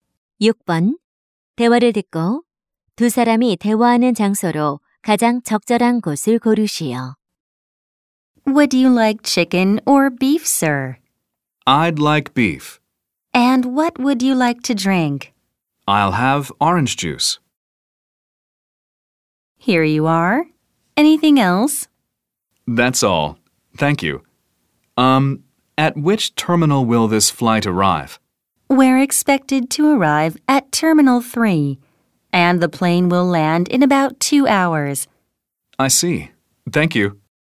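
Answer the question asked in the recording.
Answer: 비행기 안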